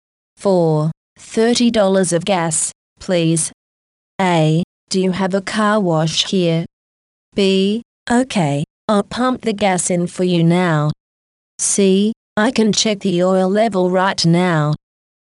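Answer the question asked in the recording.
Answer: B: Okay, I'll pump the gas in for you now.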